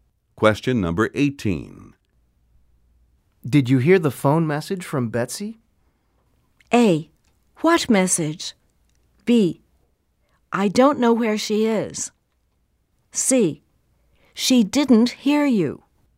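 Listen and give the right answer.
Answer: A: What message?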